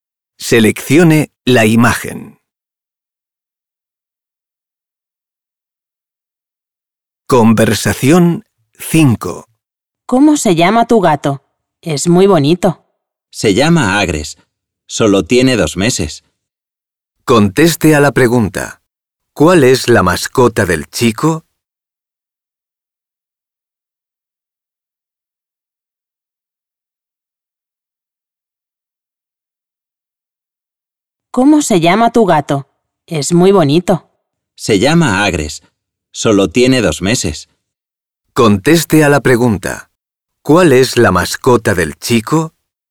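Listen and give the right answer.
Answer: un gato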